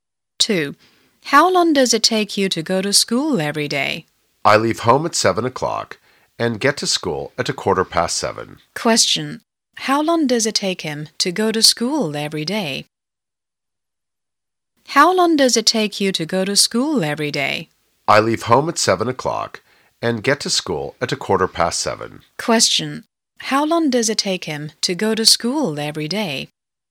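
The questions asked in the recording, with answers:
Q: How long does it take him to go to school every day?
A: 15 minutes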